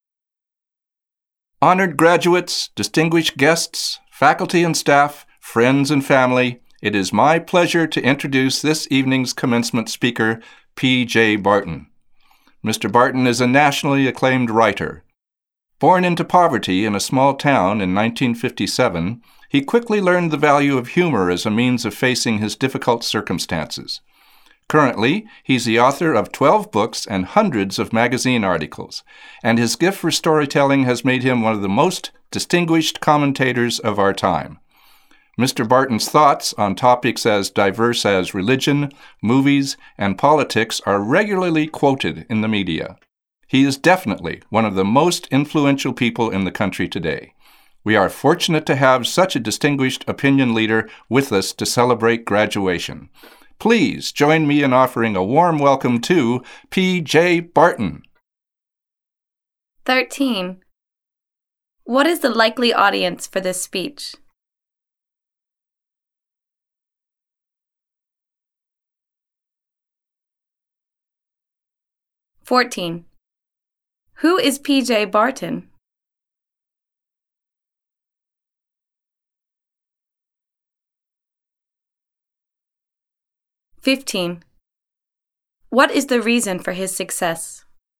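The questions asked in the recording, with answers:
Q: What is the likely audience for this speech?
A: Graduates and their guests at a commencement ceremony

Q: Who is P.J. Barton?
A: A nationally acclaimed writer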